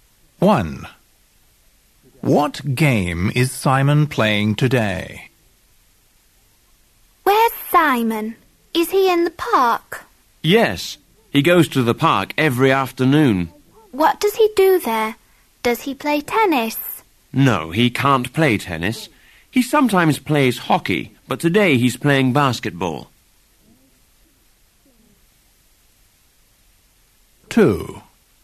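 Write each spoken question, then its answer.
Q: What game is Simon playing today?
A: basketball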